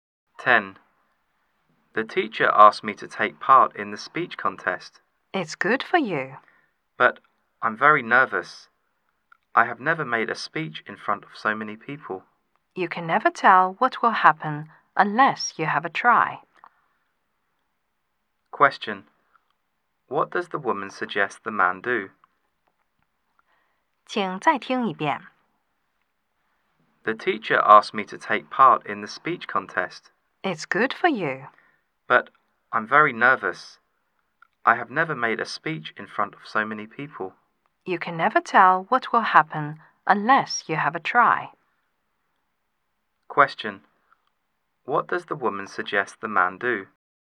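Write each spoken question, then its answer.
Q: Question. What does the woman suggest the man do?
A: Have a try and take part in the speech contest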